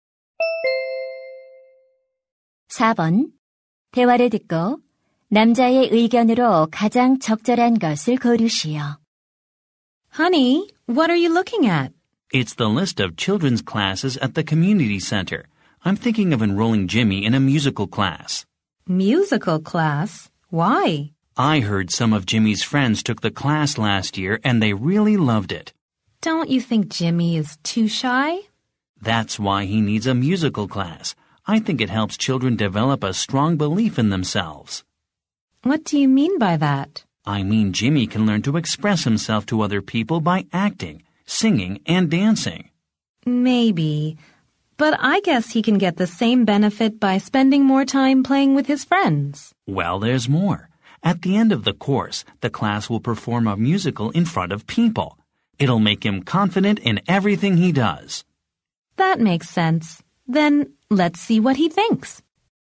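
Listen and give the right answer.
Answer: 뮤지컬 수업은 아이의 자신감을 키워 준다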